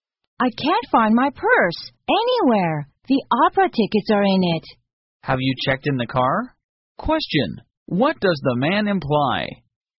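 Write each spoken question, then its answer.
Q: what does the man imply?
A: The purse may be in the car.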